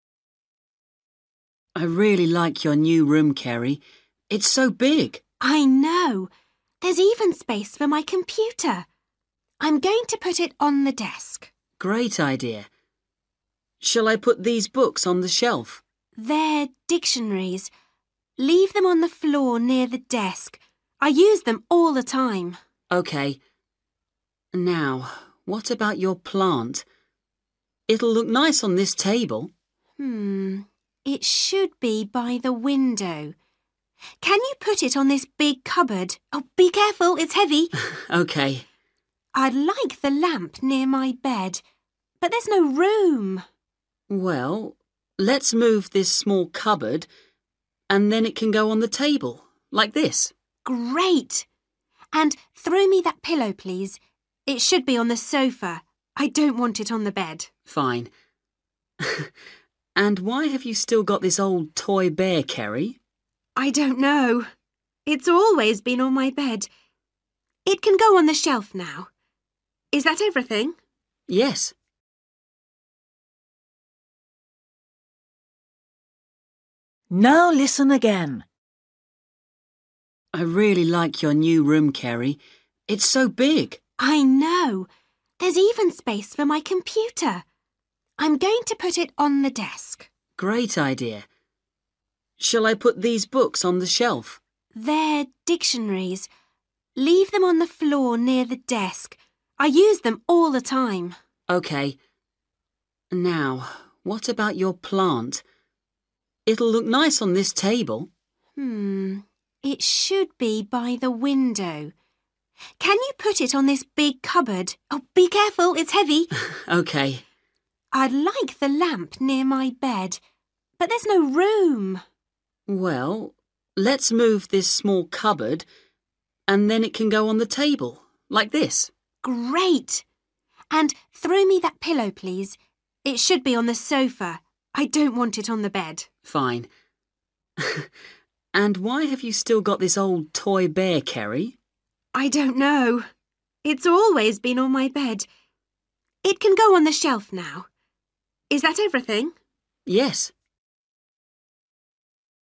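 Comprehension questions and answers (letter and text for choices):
For each question, choose the correct answer.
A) bed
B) big cupboard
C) small cupboard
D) desk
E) floor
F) shelf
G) sofa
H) table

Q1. books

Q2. plant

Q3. lamp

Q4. pillow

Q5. toy bear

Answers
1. E) floor
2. B) big cupboard
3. H) table
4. G) sofa
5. F) shelf

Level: Luyện nghe trình độ A2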